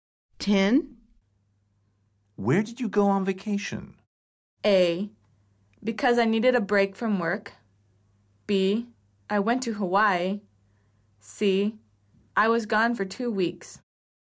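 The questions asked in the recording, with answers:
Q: Where did you go on vacation?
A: B: I went to Hawaii.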